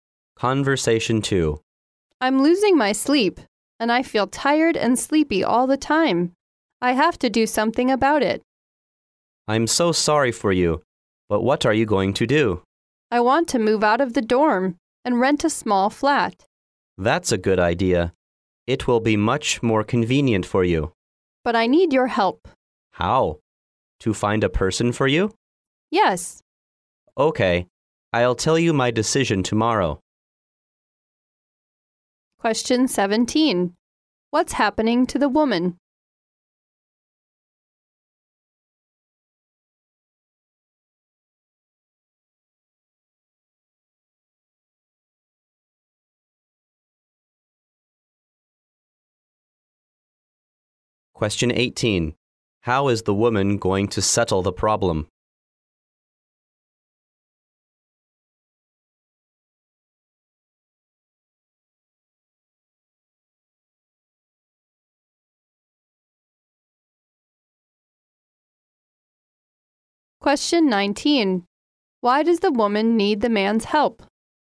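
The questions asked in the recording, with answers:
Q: What's happening to the woman?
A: She is losing sleep and feels tired and sleepy all the time.

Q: How is the woman going to settle the problem?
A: By moving out of the dorm and renting a small flat.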